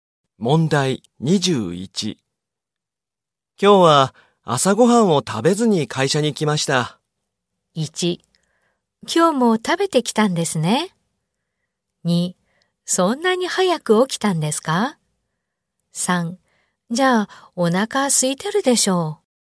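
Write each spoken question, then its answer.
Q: 今日は朝ごはんを食べずに会社に来ました。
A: 3: じゃあお腹空いてるでしょう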